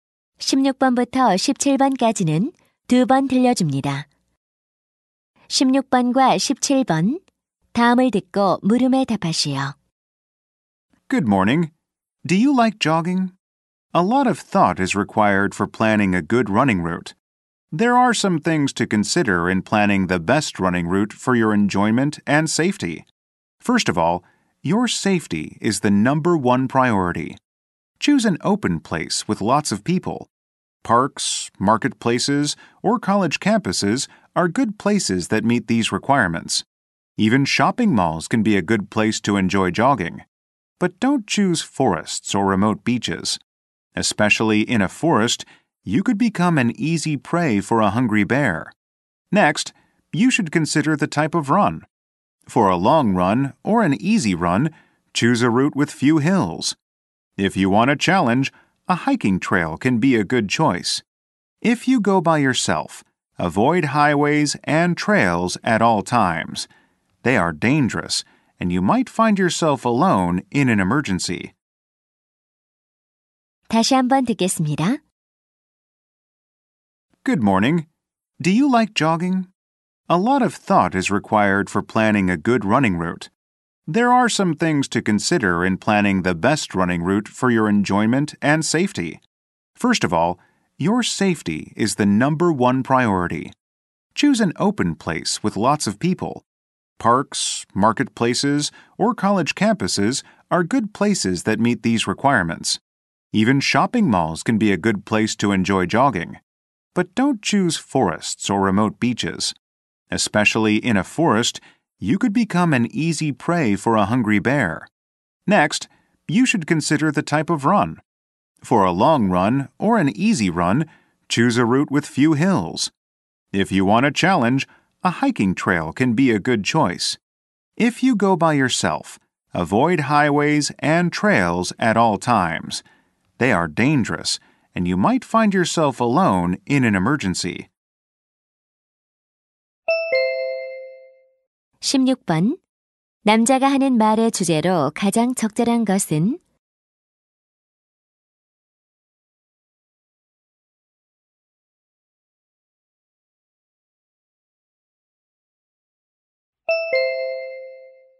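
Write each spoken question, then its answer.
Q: 남자가 하는 말의 주제로 가장 적절한 것은?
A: 안전하고 좋은 달리기 경로를 계획하는 방법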